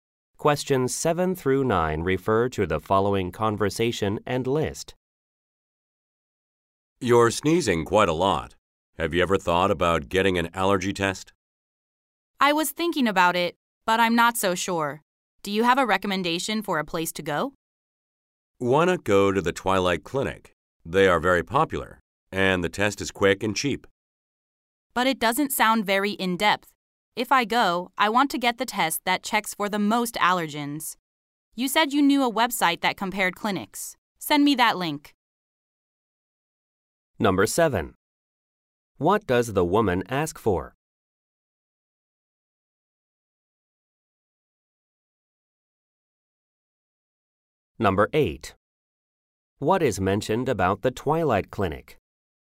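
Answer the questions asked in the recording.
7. A link to a website comparing clinics
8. It is popular, and the test is quick and cheap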